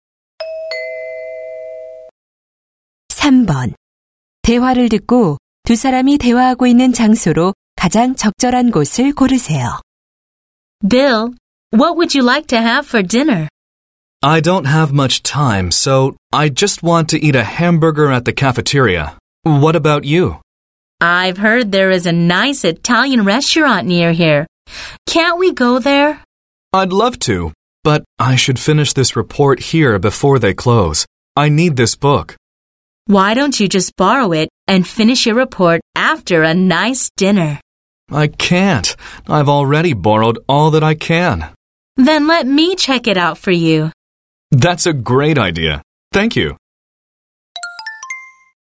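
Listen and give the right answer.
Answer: 도서관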